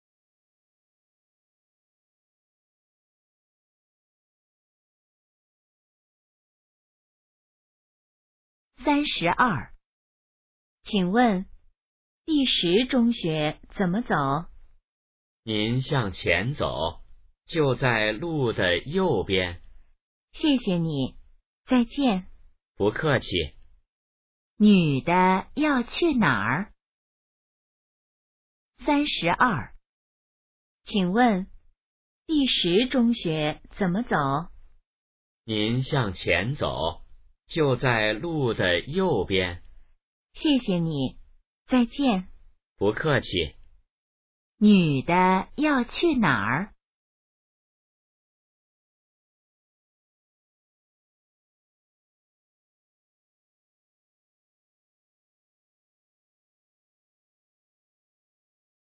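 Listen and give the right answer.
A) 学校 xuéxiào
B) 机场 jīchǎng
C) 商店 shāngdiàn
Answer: A) 学校 xuéxiào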